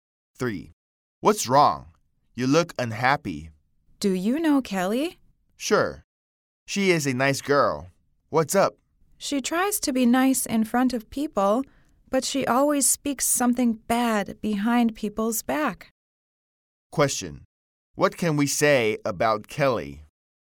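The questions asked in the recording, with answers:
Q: What can we say about Kelly?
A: She is two-faced; she is nice in front of people but speaks badly of them behind their backs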